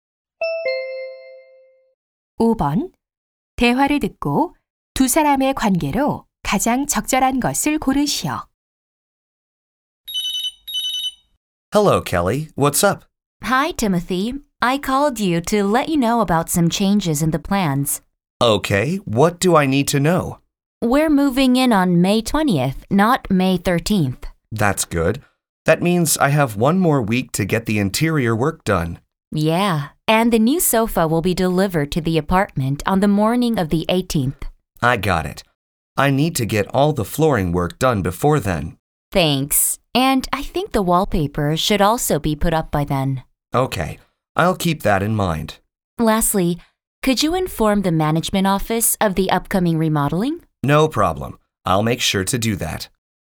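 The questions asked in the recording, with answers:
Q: 대화를 듣고 두 사람의 관계로 가장 적절한 것을 고르시오.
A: 집주인 - 실내 인테리어 업자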